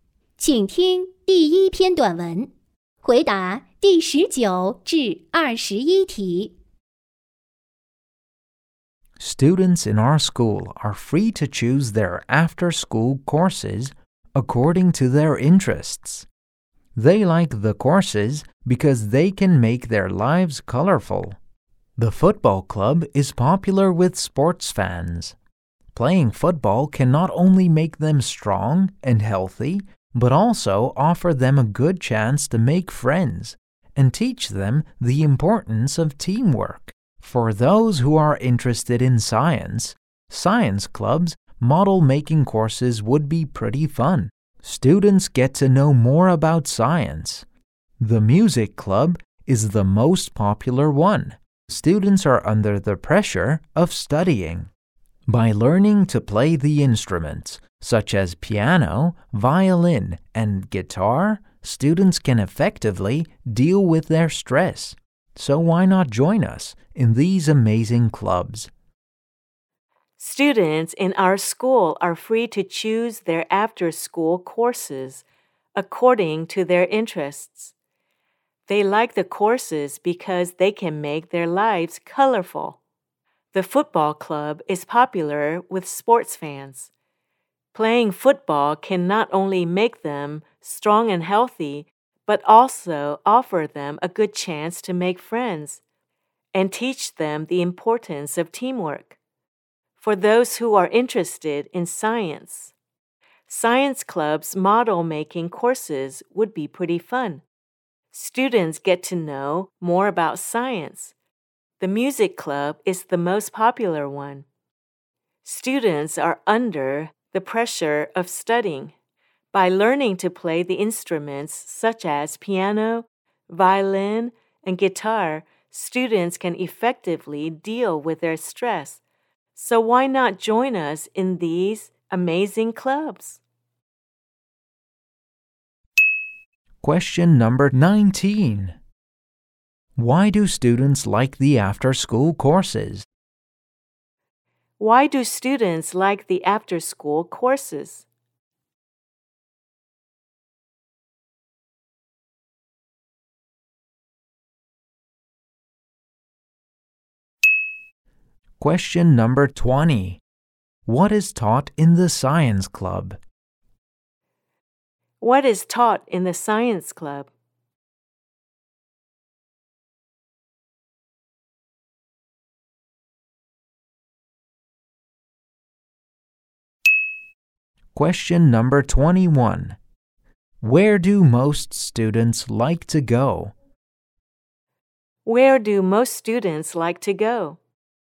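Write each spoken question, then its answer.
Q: Why do students like the after-school courses?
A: They make their lives colorful

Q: What is taught in the science club?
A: Model-making

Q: Where do most students like to go?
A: The music club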